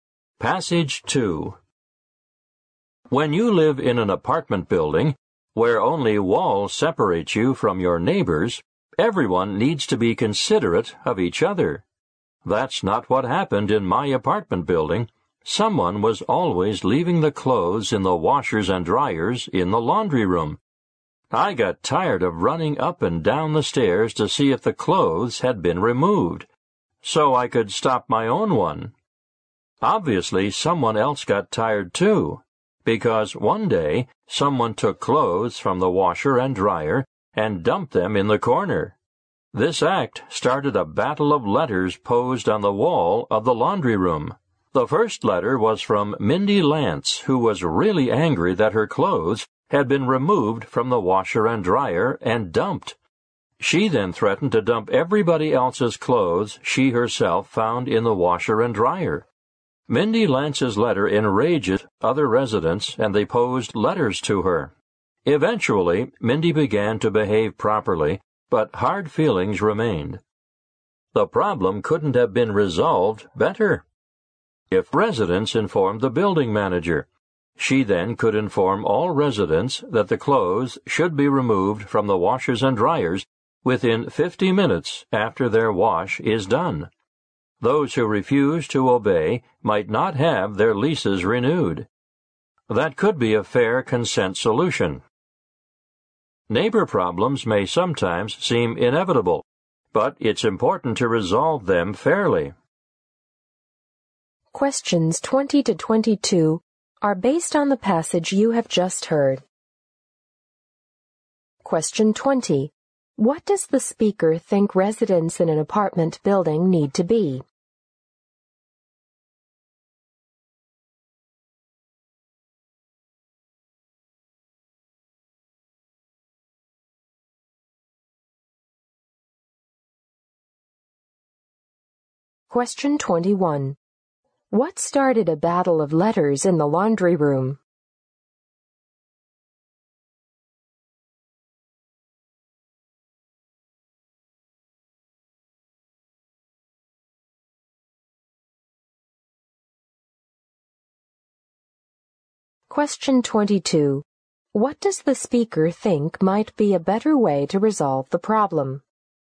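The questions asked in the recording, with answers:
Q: What does the speaker think residents in an apartment building need to be?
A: Considerate of each other

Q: What started a battle of letters in the laundry room?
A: Someone took clothes from the washer and dryer and dumped them in the corner

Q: What does the speaker think might be a better way to resolve the problem?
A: Tell the building manager, who could tell all residents to remove clothes within 50 minutes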